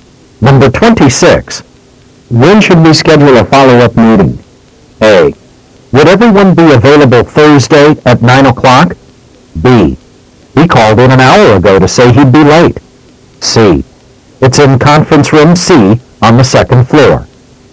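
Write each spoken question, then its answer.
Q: When should we schedule a follow-up meeting?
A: A: Would everyone be available Thursday at 9 o'clock?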